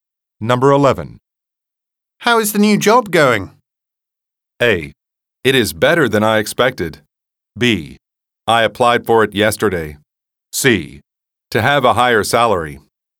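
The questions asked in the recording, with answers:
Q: How is the new job going?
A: A: It is better than I expected.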